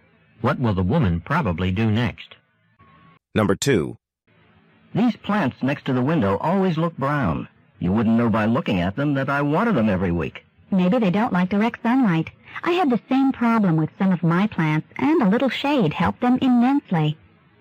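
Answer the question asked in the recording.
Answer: Move the plants out of direct sunlight into some shade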